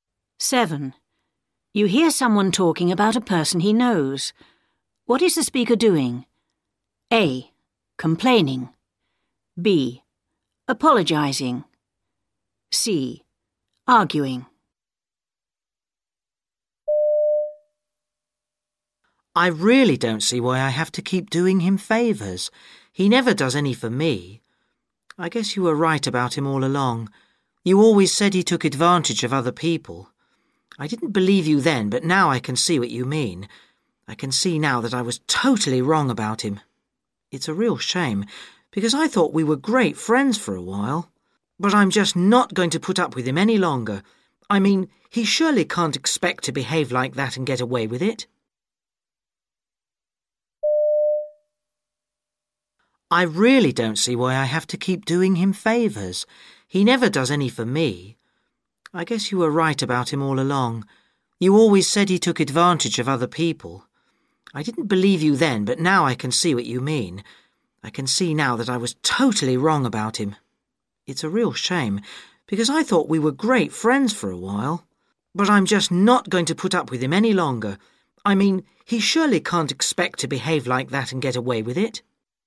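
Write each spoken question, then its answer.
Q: What is the speaker doing?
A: A: Complaining.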